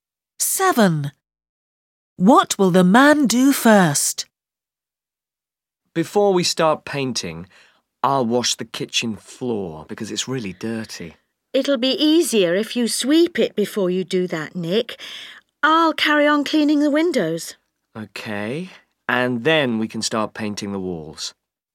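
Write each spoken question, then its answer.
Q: Seven. What will the man do first?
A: sweep the kitchen floor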